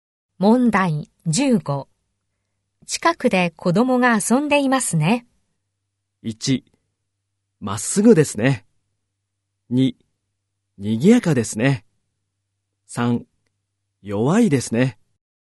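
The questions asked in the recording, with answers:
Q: 近くで子供が遊んでいますね。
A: 2: 賑やかですね。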